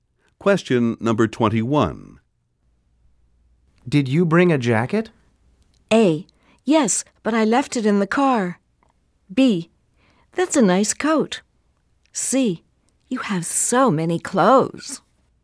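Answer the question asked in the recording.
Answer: A: Yes, but I left it in the car.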